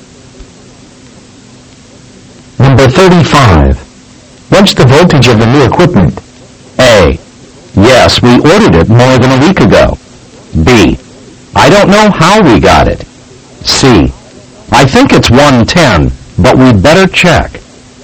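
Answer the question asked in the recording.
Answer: C: I think it's 110, but we'd better check.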